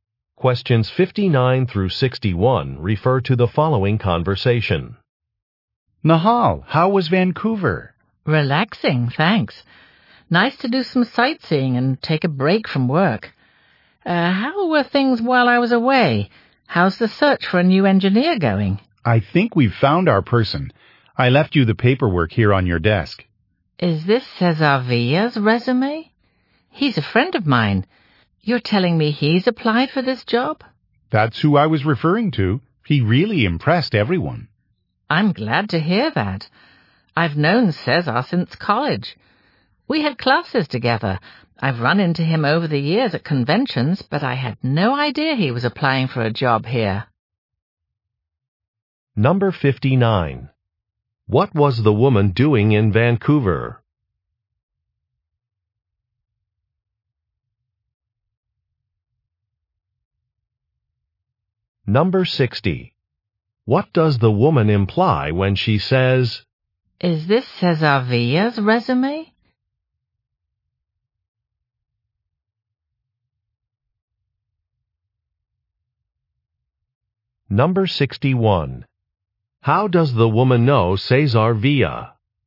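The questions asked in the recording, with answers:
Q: What was the woman doing in Vancouver?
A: Taking a vacation / sightseeing

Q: What does the woman imply when she says,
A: She is surprised

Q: How does the woman know Cesar Villa?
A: They took classes together in college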